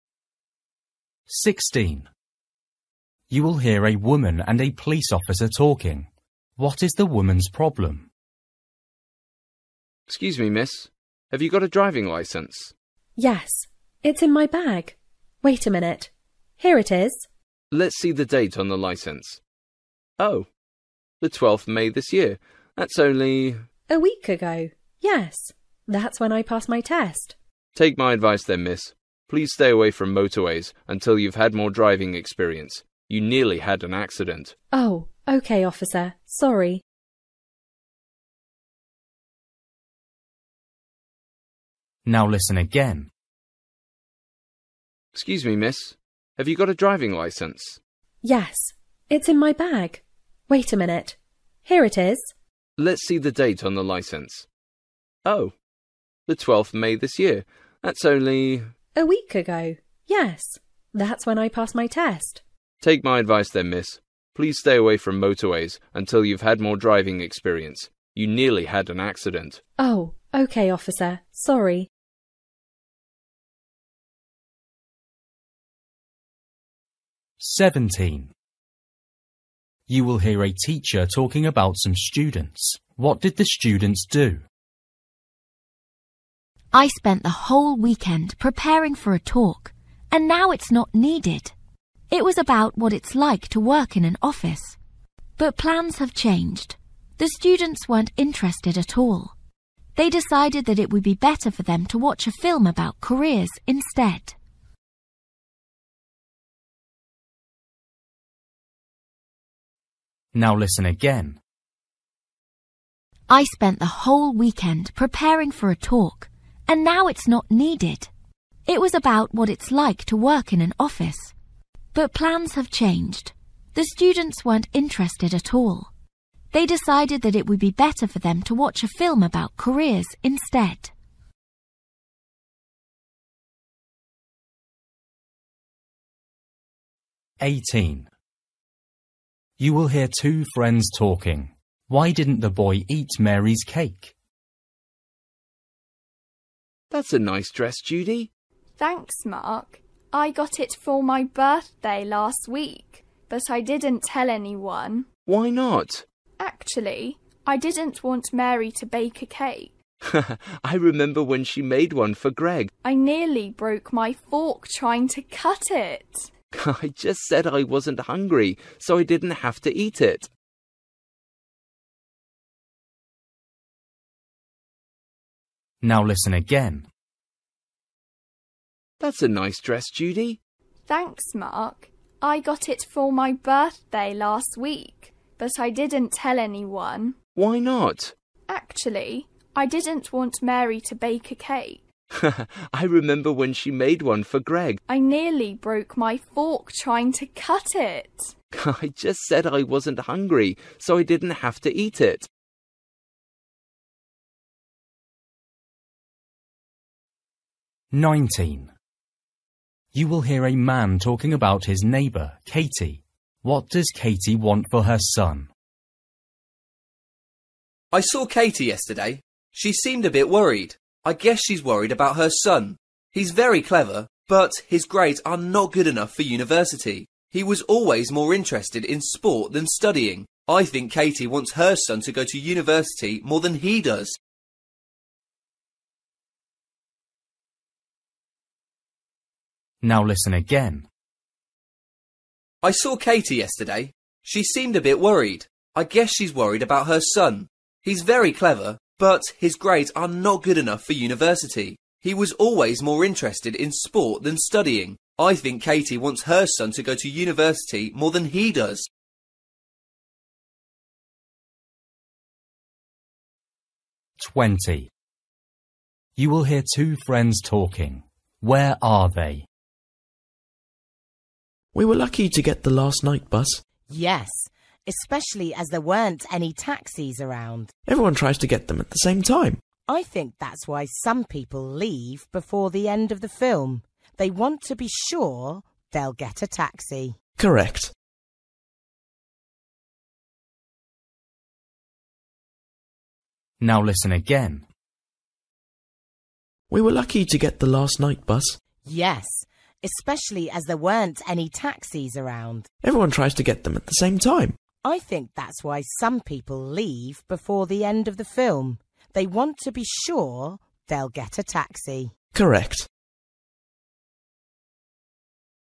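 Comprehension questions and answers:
For each question, choose the correct answer.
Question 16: You will hear a woman and a police officer talking. What is the woman's problem?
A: She is a new driver with little experience and nearly had an accident.

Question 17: You will hear a teacher talking about some students. What did the students do?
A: They decided to watch a film about careers.

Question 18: You will hear two friends talking. Why didn't the boy eat Mary's cake?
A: The cake was too hard.

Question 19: You will hear a man talking about his neighbour, Katy. What does Katy want for her son?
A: She wants him to go to university.

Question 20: You will hear two friends talking. Where are they?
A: On the night bus.

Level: Luyện nghe trình độ A2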